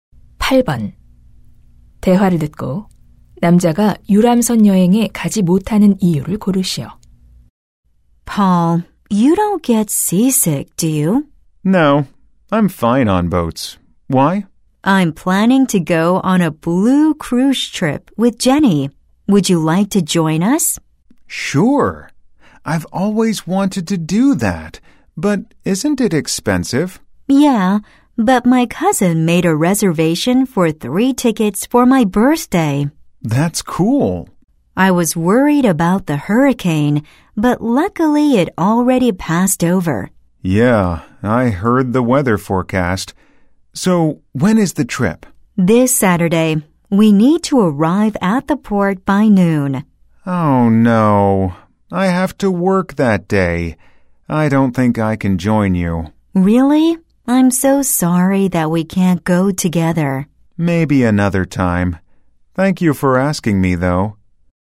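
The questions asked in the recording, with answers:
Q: 대화를 듣고 남자가 유람선 여행에 가지 못하는 이유를 고르시오.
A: 그날 일을 해야 해서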